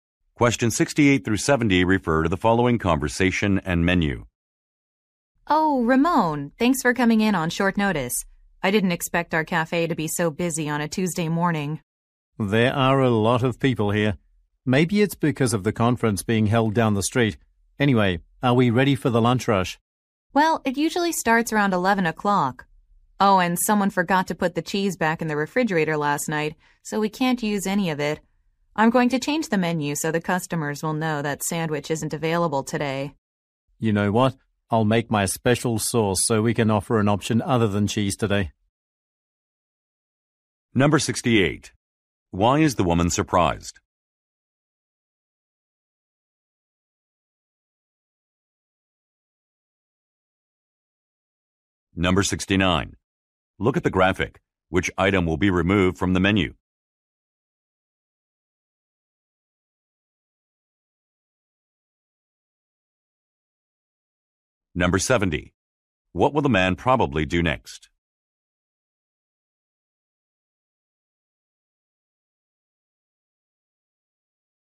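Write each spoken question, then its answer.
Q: Why is the woman surprised?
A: The cafe is very busy on a Tuesday morning

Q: What will the man probably do next?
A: Make his special sauce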